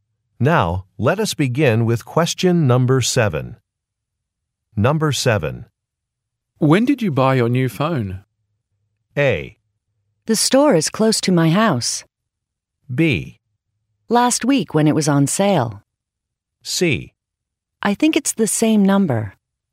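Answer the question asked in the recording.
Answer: B: Last week when it was on sale.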